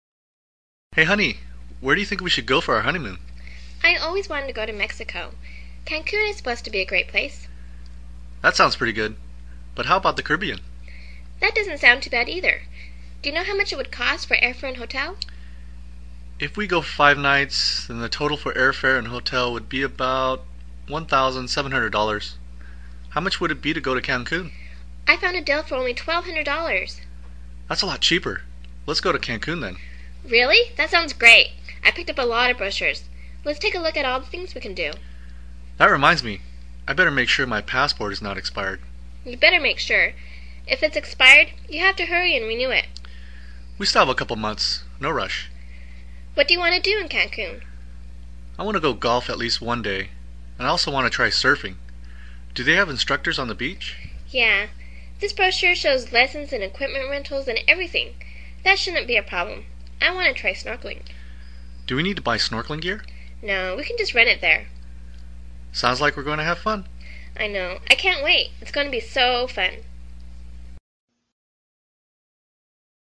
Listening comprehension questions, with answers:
Listen to the conversation, and mark each statement as either true (T) or false (F) according to what you hear.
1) These people are planning a trip to Cancun for a family vacation.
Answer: 错

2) They decided on Cancun over the Caribbean because Cancun was much cheaper.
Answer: 对

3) They got information about Cancun from the Internet.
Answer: 错

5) They will buy snorkeling gear to try snorkeling.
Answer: 错

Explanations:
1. 录音开始说到这对夫妻打算去度蜜月。故该说错误。
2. 根据录音"That's a lot cheaper. Let's go to Cancun then"可知,坎昆比加勒比地区便宜很多。故该说法正确。
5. 录音中女士问道是否需要买snorkeling gear时,男士回答说"No. We can just rent it there. "由此可知他们将会租snorkeling gear,而不是购买。故该说法错误。